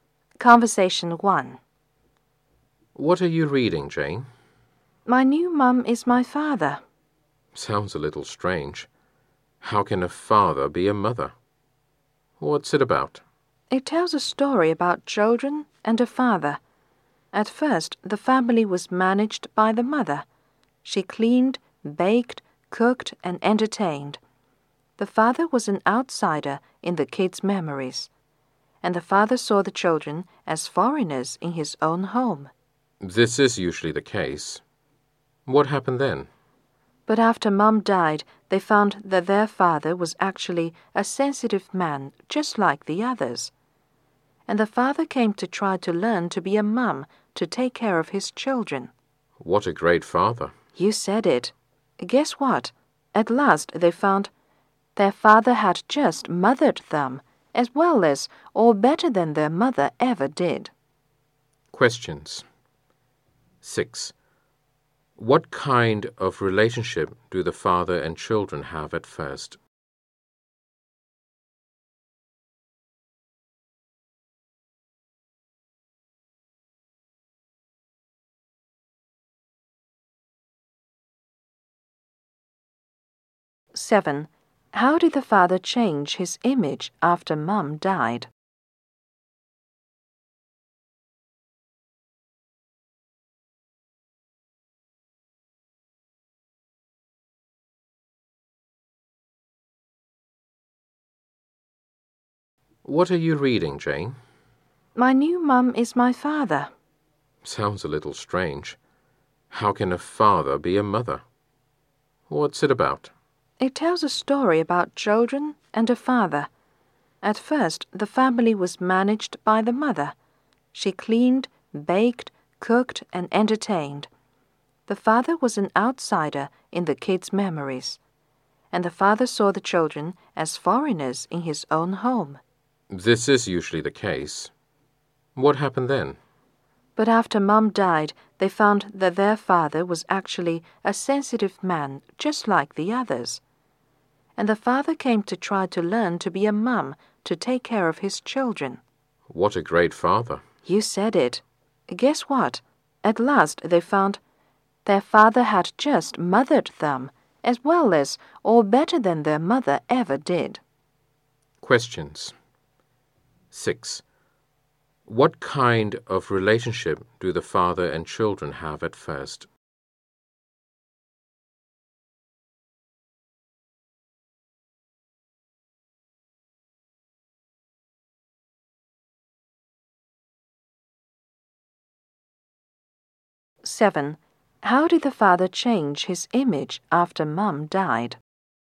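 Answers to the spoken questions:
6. Distant; they were like strangers (outsider/foreigners) to each other
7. He learned to be a mum and took care of his children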